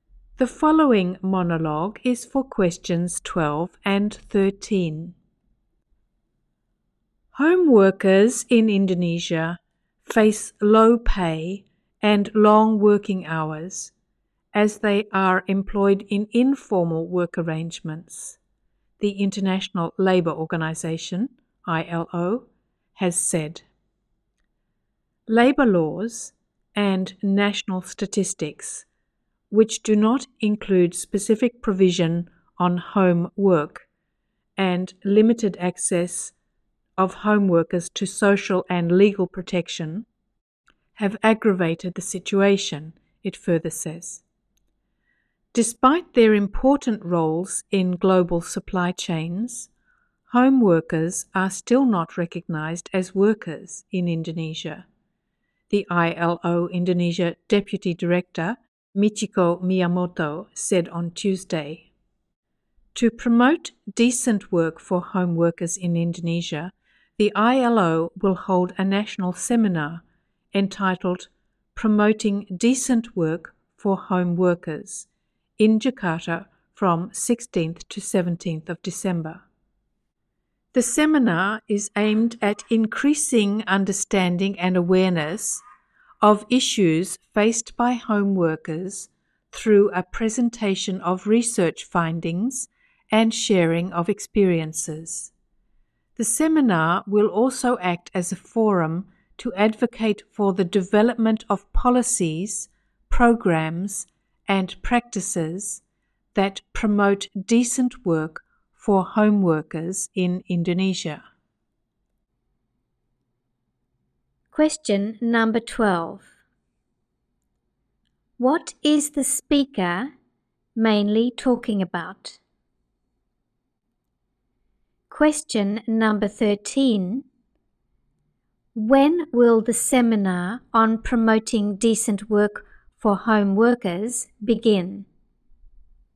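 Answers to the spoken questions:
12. The poor conditions of home workers in Indonesia and an ILO seminar to promote decent work for them
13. On 16th December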